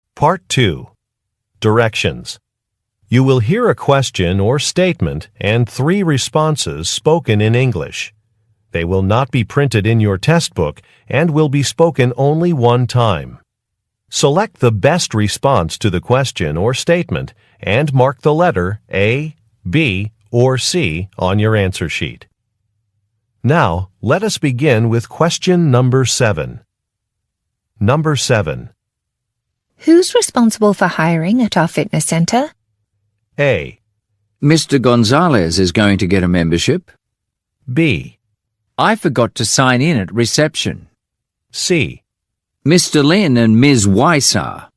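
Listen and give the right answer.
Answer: Mr. Lin and Ms. Weiss are.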